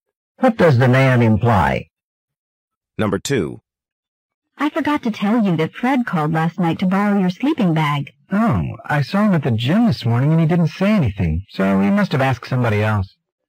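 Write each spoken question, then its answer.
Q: What does the man imply?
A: Fred probably borrowed a sleeping bag from someone else.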